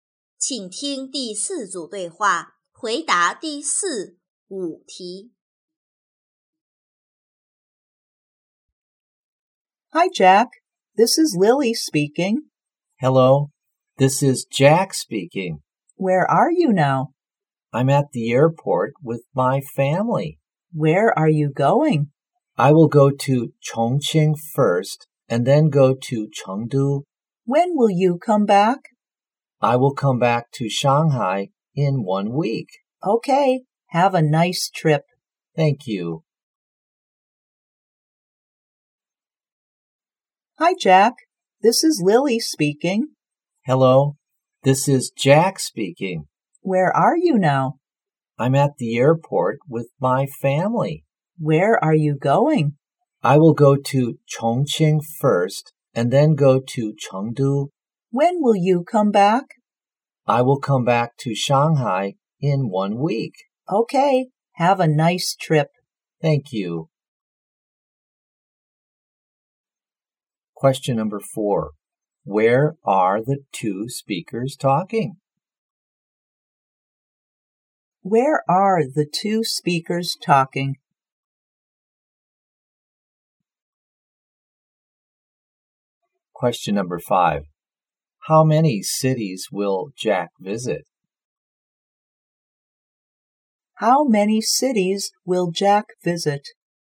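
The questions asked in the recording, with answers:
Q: How many cities will Jack visit?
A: Two (Chongqing and Chengdu)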